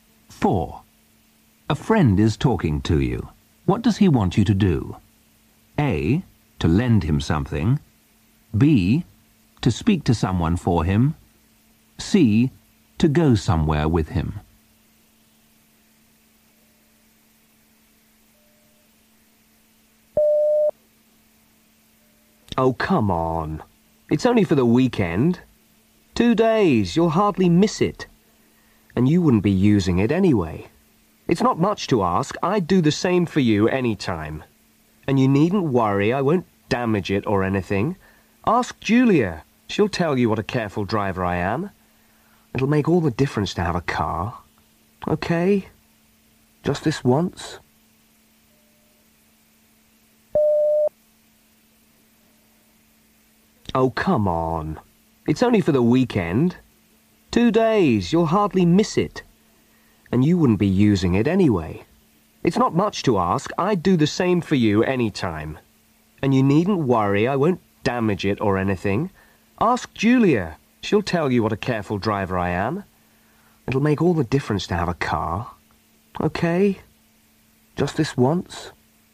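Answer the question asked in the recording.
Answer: A: to lend him something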